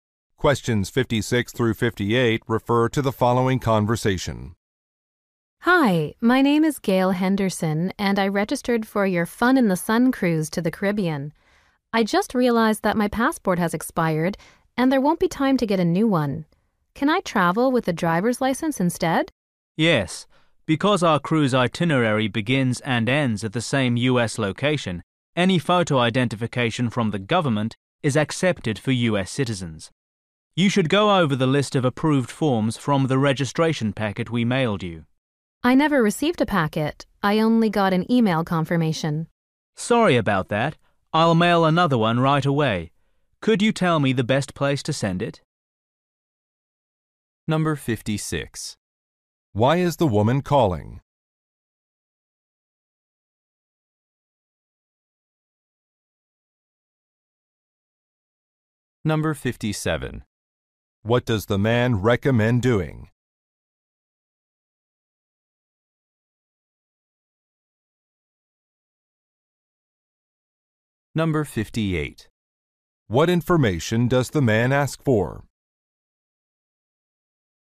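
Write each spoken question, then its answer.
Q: Why is the woman calling?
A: Her passport has expired and she asks about other ID

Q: What does the man recommend doing?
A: Reviewing the list of approved IDs in the registration packet

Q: What information does the man ask for?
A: A mailing address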